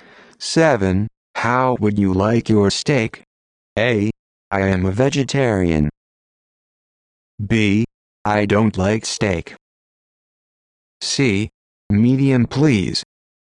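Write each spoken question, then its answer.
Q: How would you like your steak?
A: C: Medium, please.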